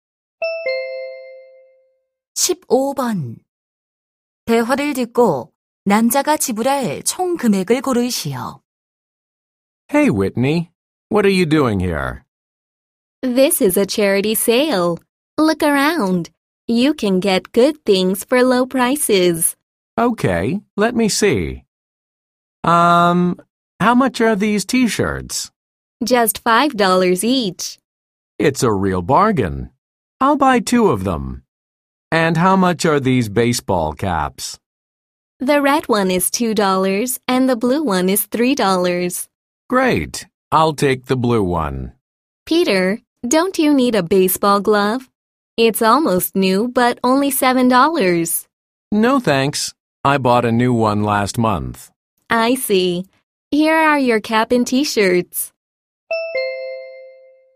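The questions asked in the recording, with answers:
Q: 대화를 듣고 남자가 지불할 총 금액을 고르시오.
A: $13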